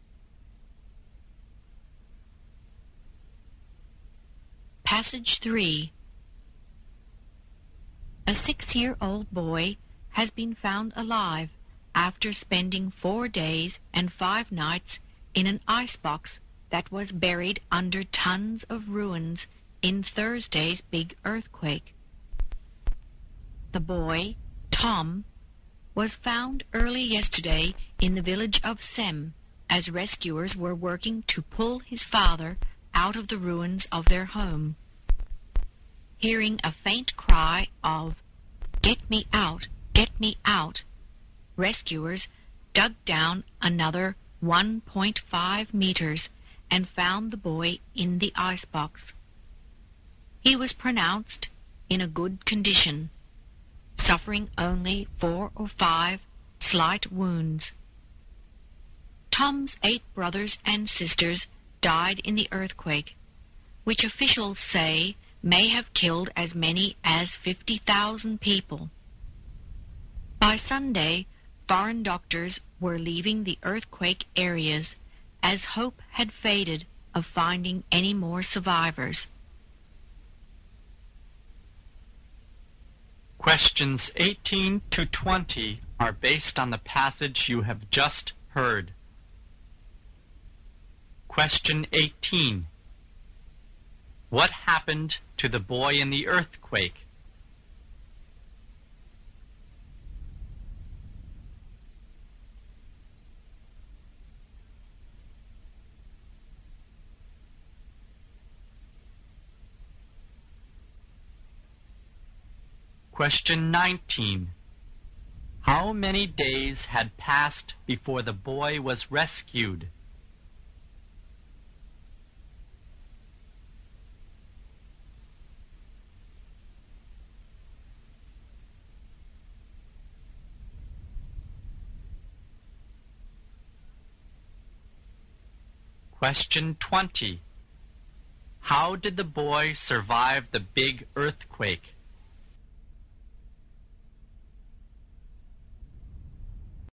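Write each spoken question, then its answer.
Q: What happened to the boy in the earthquake?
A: He was trapped in an icebox buried under ruins but survived

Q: How many days had passed before the boy was rescued?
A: Four days (and five nights)

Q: How did the boy survive the big earthquake?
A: He was protected inside an icebox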